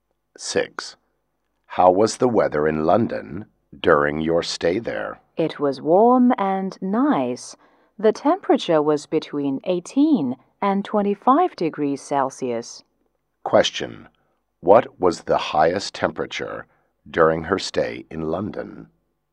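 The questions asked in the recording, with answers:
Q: What was the highest temperature during her stay in London?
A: 25 degrees Celsius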